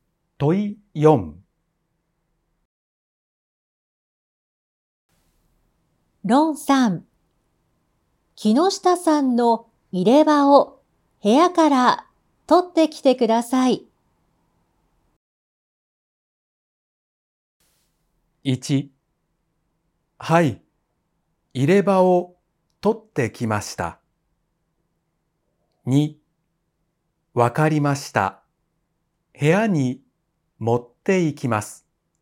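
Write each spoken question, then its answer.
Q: ロンさん、木下さんの入れ歯を部屋から取ってきてください。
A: 3: わかりました。取りに行ってきます。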